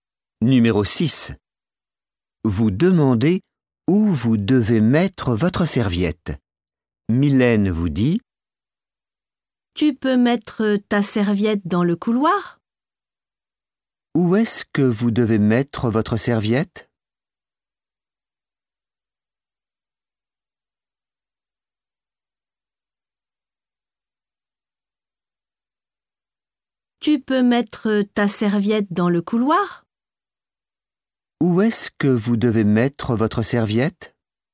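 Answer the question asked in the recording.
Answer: Dans le couloir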